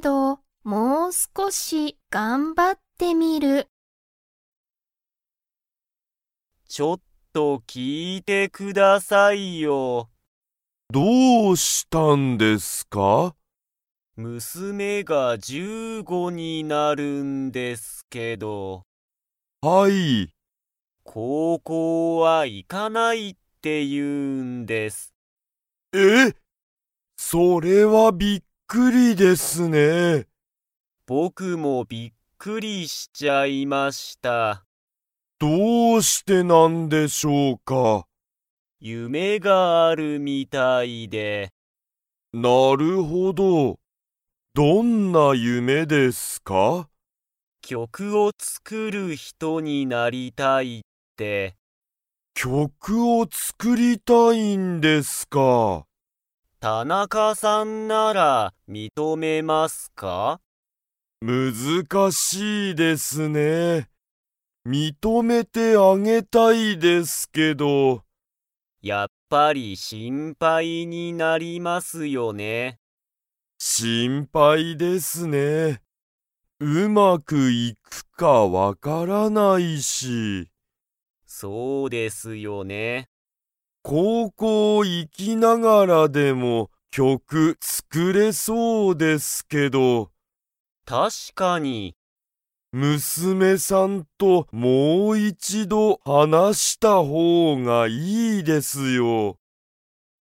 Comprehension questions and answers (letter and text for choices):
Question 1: 鈴木すずきさんの娘むすめは になりたい。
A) 高校こうこうの先生せんせい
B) 会社かいしゃの人ひと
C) 曲きょくを作つくる人ひと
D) 心配しんぱいな人ひと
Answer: C) 曲きょくを作つくる人ひと

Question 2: 鈴木すずきさんは、娘むすめのことが心配しんぱいですか?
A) はい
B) いいえ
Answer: A) はい

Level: Level 3